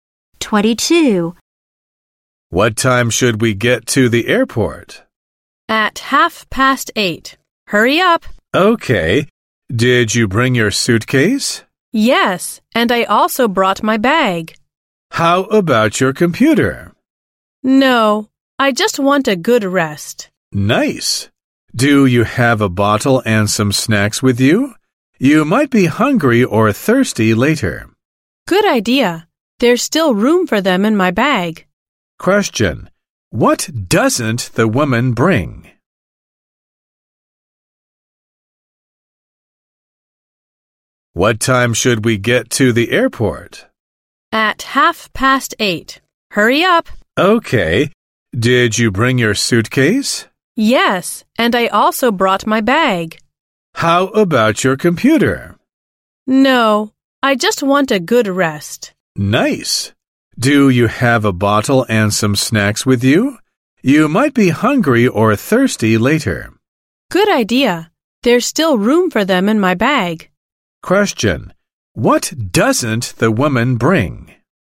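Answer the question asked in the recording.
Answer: Her computer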